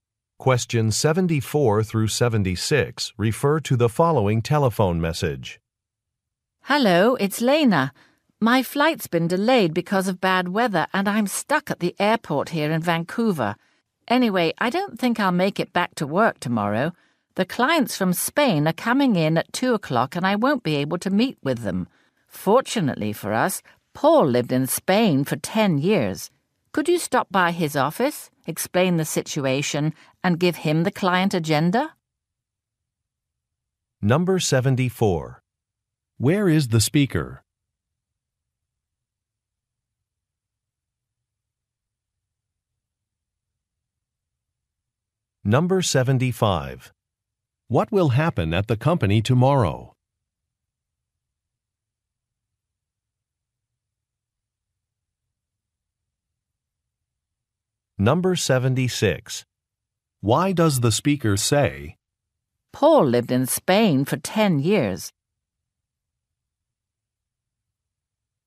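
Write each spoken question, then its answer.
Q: Where is the speaker?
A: At an airport in Vancouver

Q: What will happen at the company tomorrow?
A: Clients from Spain will visit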